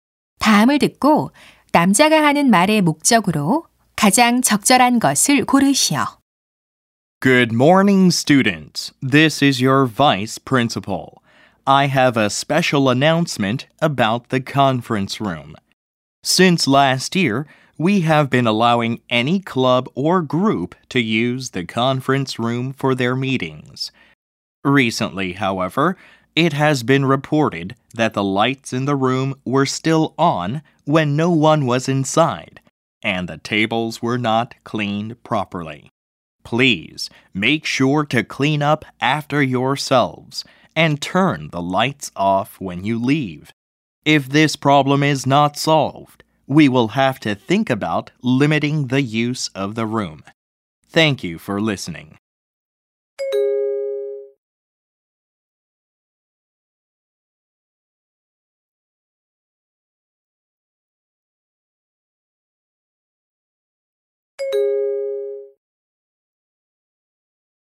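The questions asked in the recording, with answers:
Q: 다음을 듣고 남자가 하는 말의 목적으로 가장 적절한 것을 고르시오.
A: 회의실 사용 후 정리하고 불을 끄도록 당부하려고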